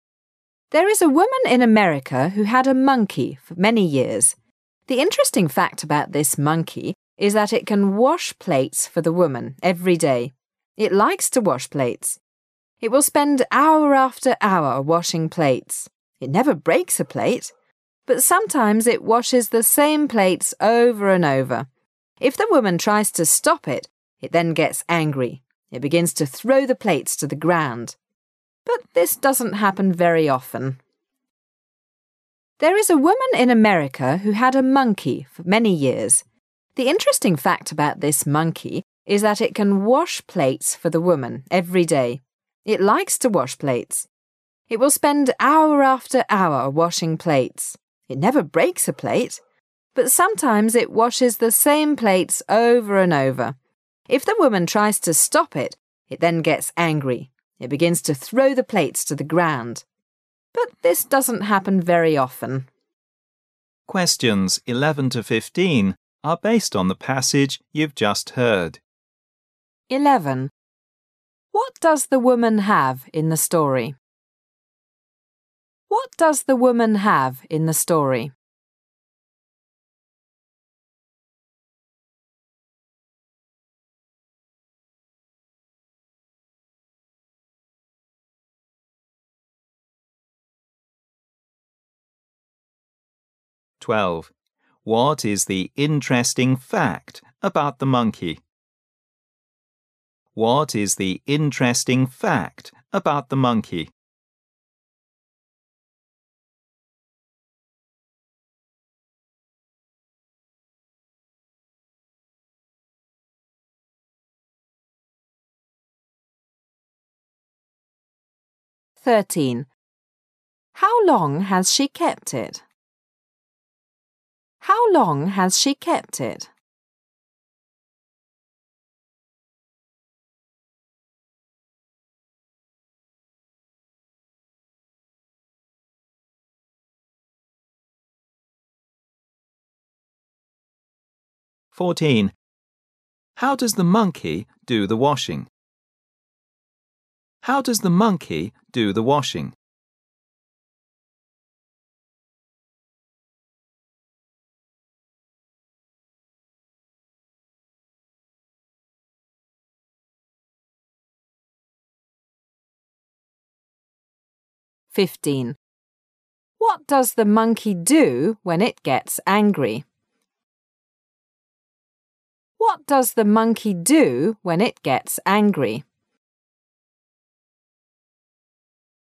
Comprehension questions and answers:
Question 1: What does the woman have in the story? She has ______.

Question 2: What is the interesting fact about the monkey? The interesting fact about this is ______?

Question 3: How long has she kept it? She has kept it______.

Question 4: How does the monkey do the washing? He does the washing______.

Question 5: What does the monkey do when he gets angry? He begins to______.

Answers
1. a monkey
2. can wash plates
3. many years
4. hour after hour
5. throw the plates to the ground

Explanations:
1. There is a woman in America who had a monkey many years. The interesting fact about this monkey is that it can wash plates for the woman every day. He likes to wash plates. He will spend hour after hour washing plates. He never breaks a plate. But sometimes he washes the same plates over and over. If the woman tries to stop him, he then gets angry. He begins to throw the plates to the ground. But this doesn't happen very often.